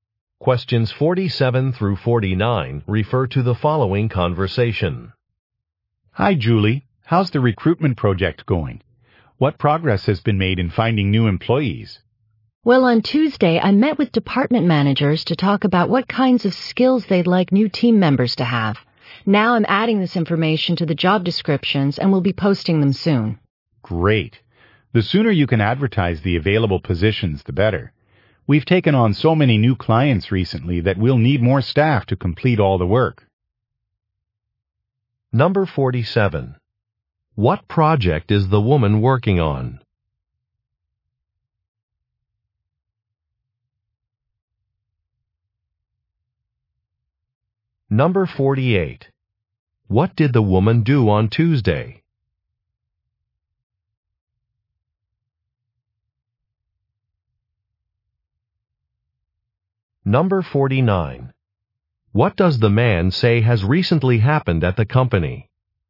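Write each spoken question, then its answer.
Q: What project is the woman working on?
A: Recruiting new employees

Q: What did the woman do on Tuesday?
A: Met with department managers

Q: What does the man say has recently happened at the company?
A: They have taken on many new clients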